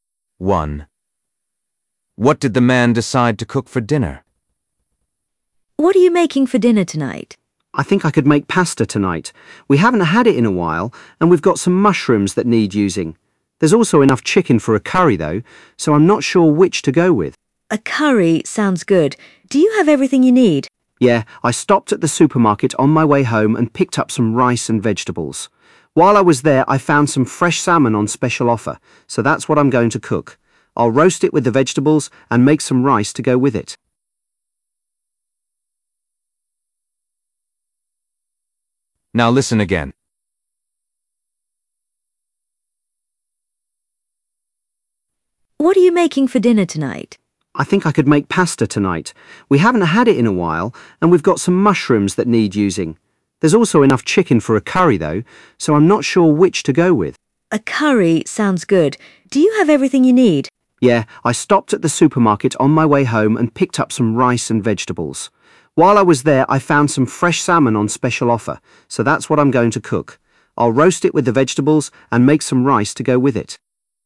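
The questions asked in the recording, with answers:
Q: What did the man decide to cook for dinner?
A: salmon (roasted with vegetables and rice)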